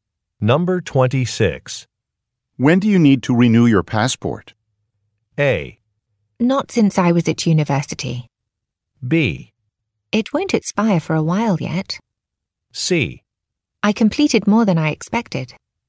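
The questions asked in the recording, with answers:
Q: When do you need to renew your passport?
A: B: It won't expire for a while yet.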